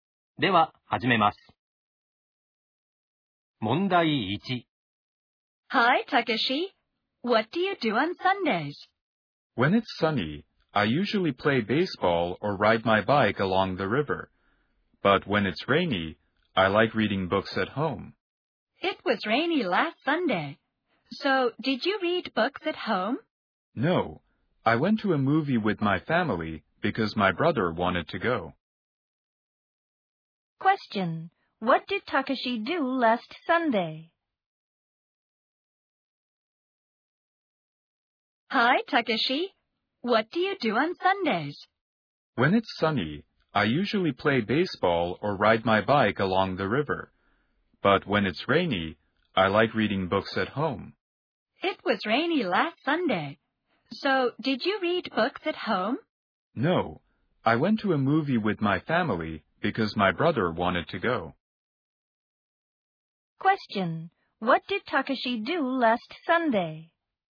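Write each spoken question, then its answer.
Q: What did Takeshi do last Sunday?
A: He went to a movie with his family.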